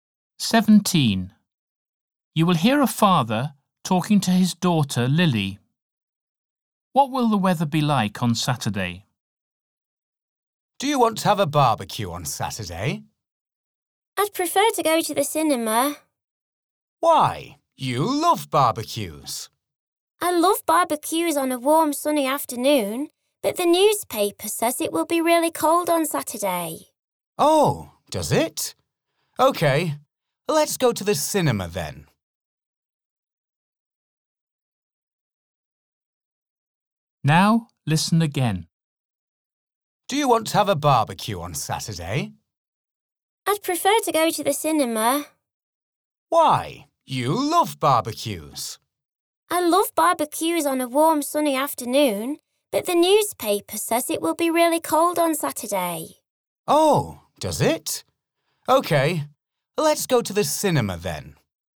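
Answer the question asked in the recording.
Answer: really cold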